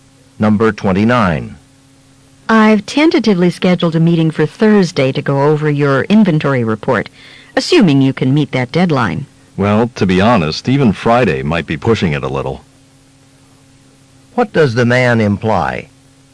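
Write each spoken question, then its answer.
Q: What does the man imply?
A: He won't finish the report by Thursday.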